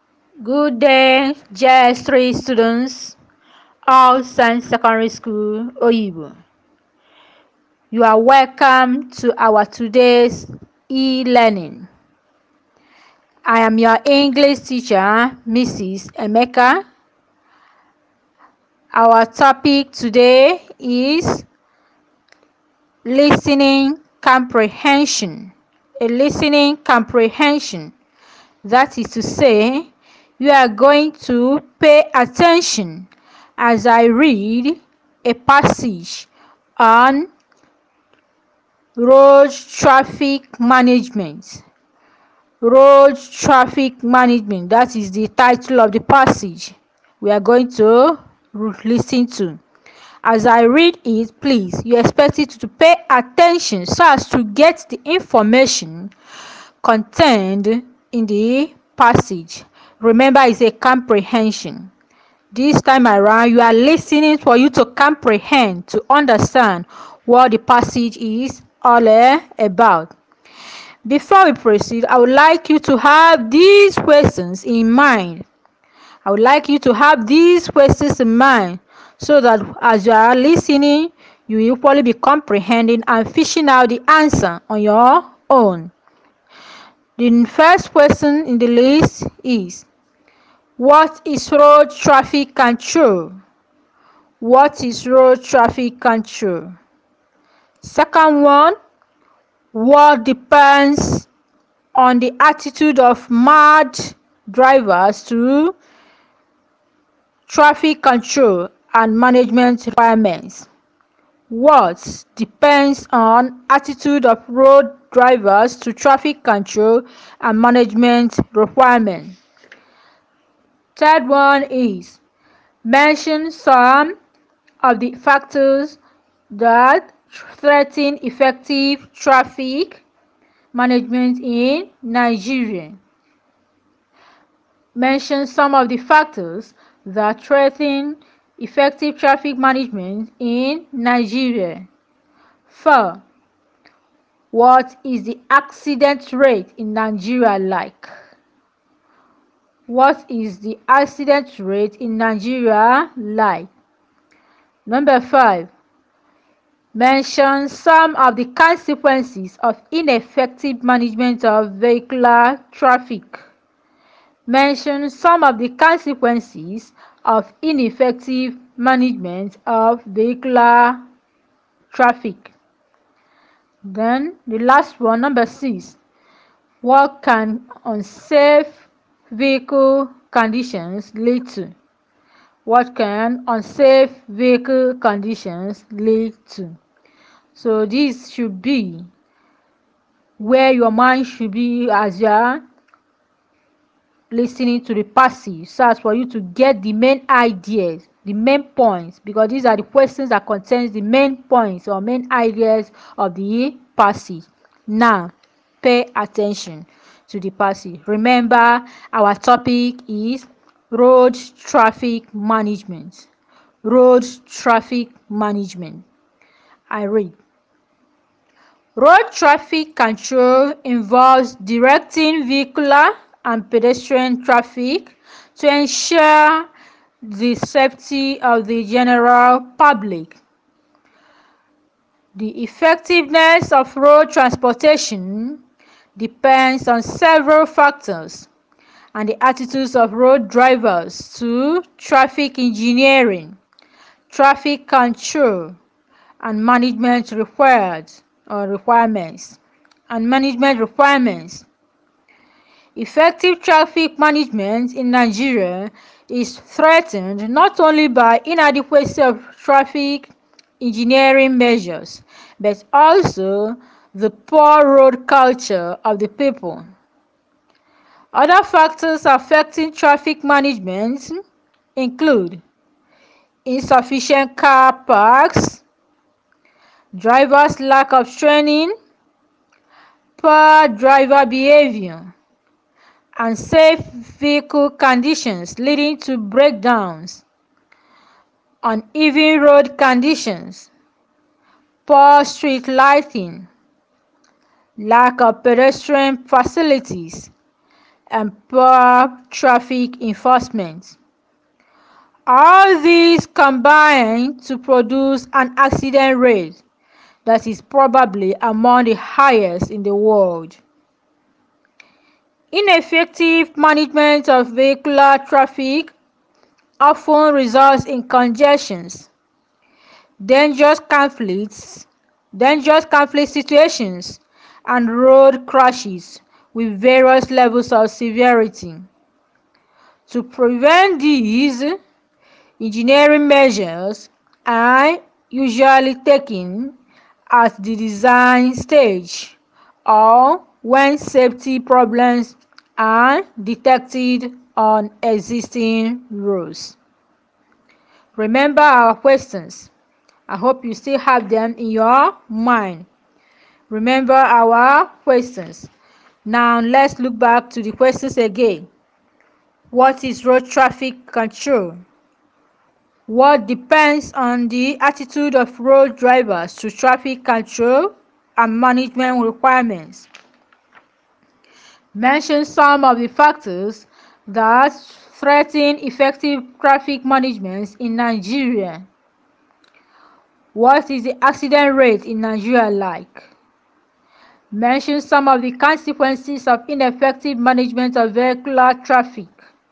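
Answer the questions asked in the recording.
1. Directing vehicular and pedestrian traffic to ensure the safety of the general public
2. The effectiveness of road transportation
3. Inadequate traffic engineering measures, poor road culture, insufficient car parks, untrained drivers, poor driver behaviour, poor street lighting, poor traffic enforcement
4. Probably among the highest in the world
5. Congestion, dangerous conflict situations and road crashes
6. Breakdowns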